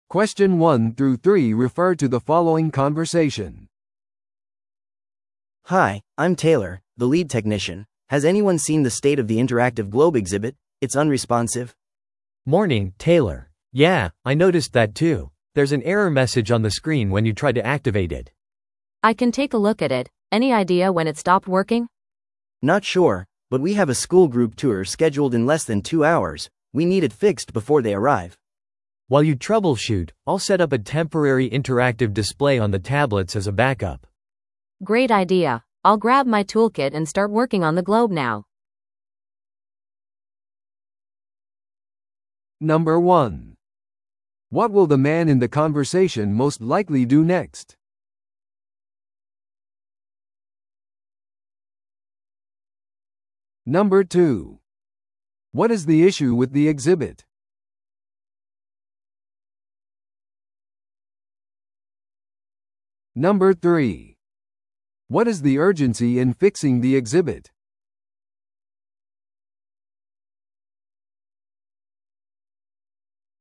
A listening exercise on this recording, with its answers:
Listen to the audio below and answer the questions.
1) What will the man in the conversation most likely do next?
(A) インタラクティブな地球儀を自分で修理する。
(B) 展示品の代替部品を準備する。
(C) タブレットにバックアップディスプレイを設定する。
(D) 小学生の団体ツアーを案内する。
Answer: (C) タブレットにバックアップディスプレイを設定する。

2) What is the issue with the exhibit?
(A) 物理的に損傷している。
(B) エラーメッセージが表示される。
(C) 間違った場所に置かれている。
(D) 教育的な内容が不足している。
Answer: (B) エラーメッセージが表示される。

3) What is the urgency in fixing the exhibit?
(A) 博物館の閉館時間が迫っている。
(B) すぐにテクノロジーショーがある。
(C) テイラーがその日に出発する。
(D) 小学生の団体が間もなく訪れる。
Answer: (D) 小学生の団体が間もなく訪れる。

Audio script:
A: Hi, I'm Taylor, the lead technician. Has anyone seen the state of the interactive globe exhibit? It's unresponsive.
B: Morning, Taylor. Yeah, I noticed that too. There's an error message on the screen when you try to activate it.
C: I can take a look at it. Any idea when it stopped working?
A: Not sure, but we have a school group tour scheduled in less than two hours. We need it fixed before they arrive.
B: While you troubleshoot, I'll set up a temporary interactive display on the tablets as a backup.
C: Great idea. I'll grab my toolkit and start working on the globe now.

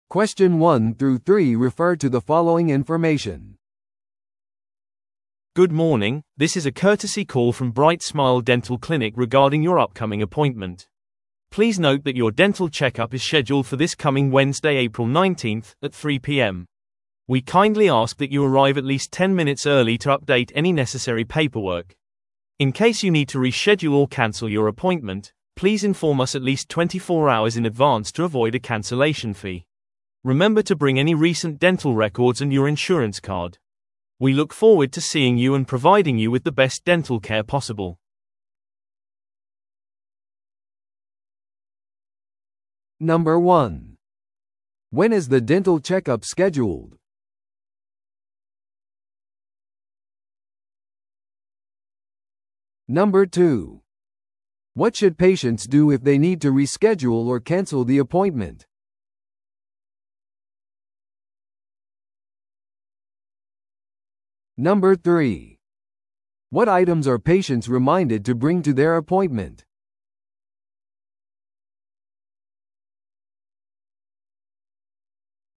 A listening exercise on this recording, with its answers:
Listen to the audio below and answer the questions.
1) When is the dental checkup scheduled?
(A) この火曜日の午後3時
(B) この水曜日の午後3時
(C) この木曜日の午後3時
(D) この金曜日の午後3時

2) What should patients do if they need to reschedule or cancel the appointment?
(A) 予約日当日に電話する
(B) クリニックを訪問する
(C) 少なくとも24時間前にクリニックに通知する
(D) 予約後にメールを送る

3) What items are patients reminded to bring to their appointment?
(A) 最近の歯科記録と保険証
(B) 支払いの現金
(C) 現在使用している薬のリスト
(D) 紹介状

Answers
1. (B) この水曜日の午後3時
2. (C) 少なくとも24時間前にクリニックに通知する
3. (A) 最近の歯科記録と保険証

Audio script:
Good morning, this is a courtesy call from Bright Smile Dental Clinic regarding your upcoming appointment. Please note that your dental checkup is scheduled for this coming Wednesday, April 19th, at 3pm. We kindly ask that you arrive at least 10 minutes early to update any necessary paperwork. In case you need to reschedule or cancel your appointment, please inform us at least 24 hours in advance to avoid a cancellation fee. Remember to bring any recent dental records and your insurance card. We look forward to seeing you and providing you with the best dental care possible.

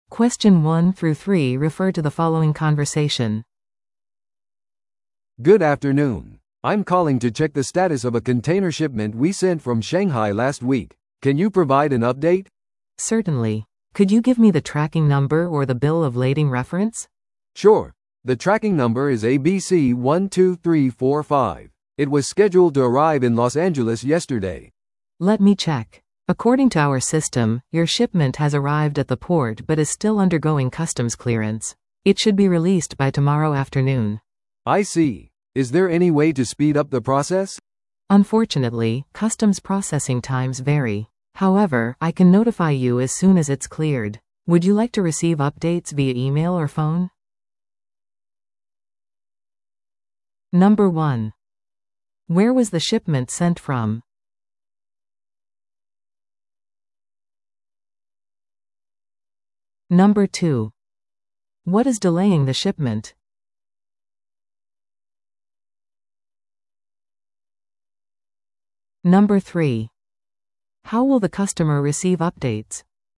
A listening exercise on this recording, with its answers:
Listen to the audio below and answer the questions.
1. Where was the shipment sent from?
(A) 東京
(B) 上海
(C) シンガポール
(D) 香港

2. What is delaying the shipment?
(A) 海上の嵐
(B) 税関手続き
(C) 機械トラブル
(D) 労働ストライキ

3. How will the customer receive updates?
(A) 郵送で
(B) メールまたは電話で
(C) ウェブサイトを通じて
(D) 船会社のマネージャーから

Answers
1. (B) 上海
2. (B) 税関手続き
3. (B) メールまたは電話で

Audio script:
A: "Good afternoon. I'm calling to check the status of a container shipment we sent from Shanghai last week. Can you provide an update?"
B: "Certainly. Could you give me the tracking number or the bill of lading reference?"
A: "Sure, the tracking number is ABC12345. It was scheduled to arrive in Los Angeles yesterday."
B: "Let me check. According to our system, your shipment has arrived at the port but is still undergoing customs clearance. It should be released by tomorrow afternoon."
A: "I see. Is there any way to speed up the process?"
B: "Unfortunately, customs processing times vary. However, I can notify you as soon as it's cleared. Would you like to receive updates via email or phone?"

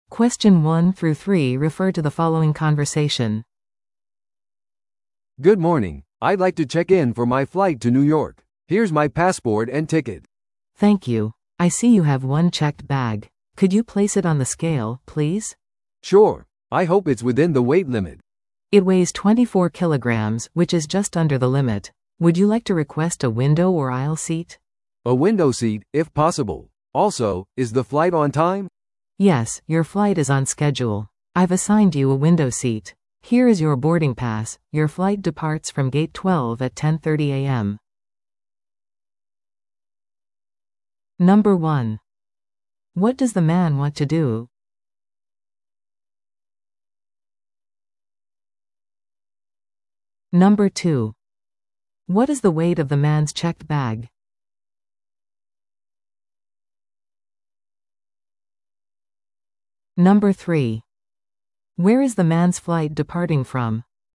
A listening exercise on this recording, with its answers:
Listen to the audio below and answer the questions.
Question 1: What does the man want to do?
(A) フライトを予約する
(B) フライトのチェックインをする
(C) チケットを変更する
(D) 座席をアップグレードする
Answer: (B) フライトのチェックインをする

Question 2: What is the weight of the man's checked bag?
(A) 18キロ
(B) 24キロ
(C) 28キロ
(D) 32キロ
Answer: (B) 24キロ

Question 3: Where is the man's flight departing from?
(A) 6番ゲート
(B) 9番ゲート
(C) 12番ゲート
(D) 15番ゲート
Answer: (C) 12番ゲート

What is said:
Flight check-in
A: "Good morning, I'd like to check in for my flight to New York. Here's my passport and ticket."
B: "Thank you. I see you have one checked bag. Could you place it on the scale, please?"
A: "Sure. I hope it's within the weight limit."
B: "It weighs 24 kilograms, which is just under the limit. Would you like to request a window or aisle seat?"
A: "A window seat, if possible. Also, is the flight on time?"
B: "Yes, your flight is on schedule. I've assigned you a window seat. Here is your boarding pass—your flight departs from Gate 12 at 10:30 AM."

